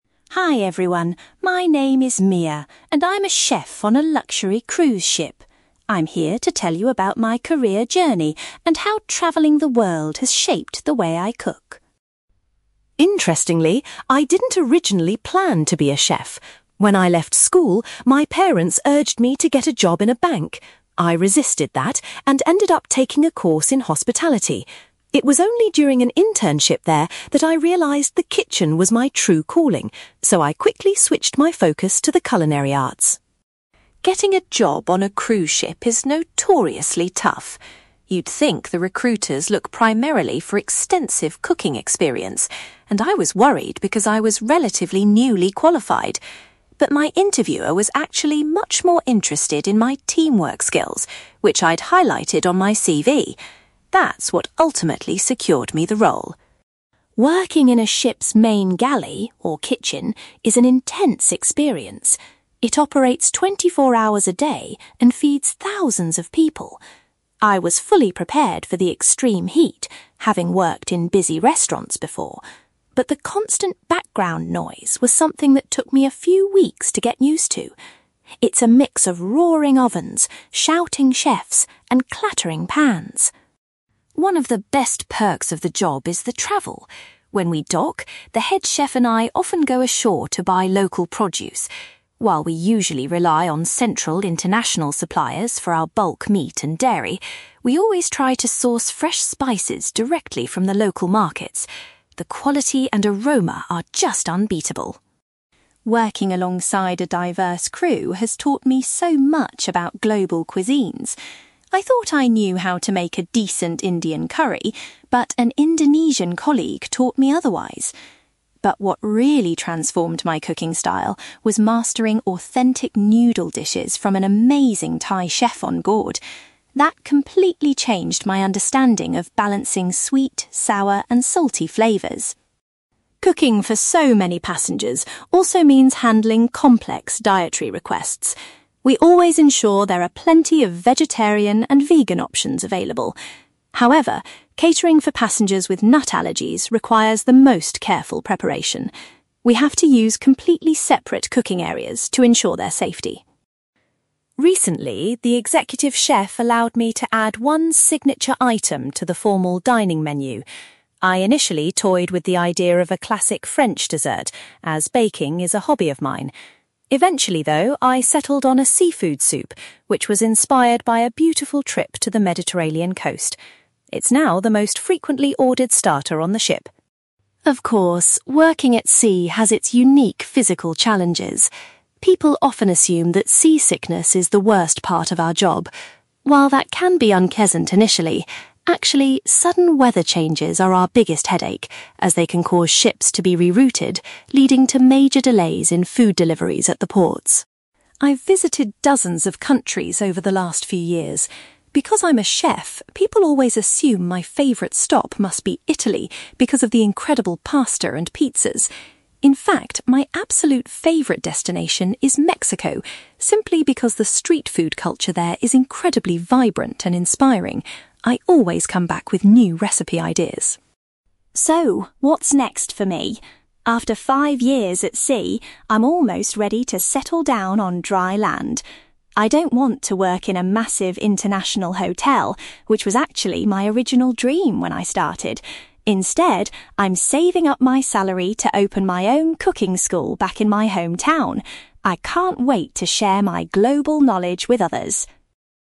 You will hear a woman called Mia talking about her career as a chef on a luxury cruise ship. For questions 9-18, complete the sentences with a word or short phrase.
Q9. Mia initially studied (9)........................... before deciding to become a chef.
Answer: hospitality

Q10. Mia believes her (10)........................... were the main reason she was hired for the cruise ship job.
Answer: teamwork skills

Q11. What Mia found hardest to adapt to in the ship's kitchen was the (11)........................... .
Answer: background noise

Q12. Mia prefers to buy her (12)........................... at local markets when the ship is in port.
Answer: spices

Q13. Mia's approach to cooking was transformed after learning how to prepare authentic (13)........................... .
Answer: noodle dishes

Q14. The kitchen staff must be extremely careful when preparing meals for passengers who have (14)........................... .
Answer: nut allergies

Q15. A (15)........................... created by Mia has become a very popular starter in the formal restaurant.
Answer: seafood soup

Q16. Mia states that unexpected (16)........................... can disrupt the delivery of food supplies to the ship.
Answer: weather changes

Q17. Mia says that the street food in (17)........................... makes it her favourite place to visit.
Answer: Mexico

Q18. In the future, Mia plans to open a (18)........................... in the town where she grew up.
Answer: cooking school

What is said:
Mia: Hi everyone, my name is Mia, and I'm a chef on a luxury cruise ship. I'm here to tell you about my career journey and how travelling the world has shaped the way I cook.
Interestingly, I didn't originally plan to be a chef. When I left school, my parents urged me to get a job in a bank. I resisted that, and ended up taking a course in hospitality. It was only during an internship there that I realised the kitchen was my true calling, so I quickly switched my focus to the culinary arts.
Getting a job on a cruise ship is notoriously tough. You'd think the recruiters look primarily for extensive cooking experience, and I was worried because I was relatively newly qualified. But my interviewer was actually much more interested in my teamwork skills, which I'd highlighted on my CV. That's what ultimately secured me the role.
Working in a ship's main galley, or kitchen, is an intense experience. It operates twenty-four hours a day and feeds thousands of people. I was fully prepared for the extreme heat, having worked in busy restaurants before. But the constant background noise was something that took me a few weeks to get used to. It's a mix of roaring ovens, shouting chefs, and clattering pans!
One of the best perks of the job is the travel. When we dock, the head chef and I often go ashore to buy local produce. While we usually rely on central international suppliers for our bulk meat and dairy, we always try to source fresh spices directly from the local markets. The quality and aroma are just unbeatable.
Working alongside a diverse crew has taught me so much about global cuisines. I thought I knew how to make a decent Indian curry, but an Indonesian colleague taught me otherwise. But what really transformed my cooking style was mastering authentic noodle dishes from an amazing Thai chef onboard. That completely changed my understanding of balancing sweet, sour, and salty flavours.
Cooking for so many passengers also means handling complex dietary requests. We always ensure there are plenty of vegetarian and vegan options available. However, catering for passengers with nut allergies requires the most careful preparation. We have to use completely separate cooking areas to ensure their safety.
Recently, the executive chef allowed me to add one signature item to the formal dining menu. I initially toyed with the idea of a classic French dessert, as baking is a hobby of mine. Eventually, though, I settled on a seafood soup, which was inspired by a beautiful trip to the Mediterranean coast. It's now the most frequently ordered starter on the ship!
Of course, working at sea has its unique physical challenges. People often assume that seasickness is the worst part of our job. While that can be unpleasant initially, actually, sudden weather changes are our biggest headache, as they can cause ships to be rerouted, leading to major delays in food deliveries at the ports.
I've visited dozens of countries over the last few years. Because I'm a chef, people always assume my favourite stop must be Italy because of the incredible pasta and pizzas. In fact, my absolute favourite destination is Mexico, simply because the street food culture there is incredibly vibrant and inspiring. I always come back with new recipe ideas.
So, what's next for me? After five years at sea, I'm almost ready to settle down on dry land. I don't want to work in a massive international hotel, which was actually my original dream when I started. Instead, I'm saving up my salary to open my own cooking school back in my hometown. I can't wait to share my global knowledge with others.

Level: B2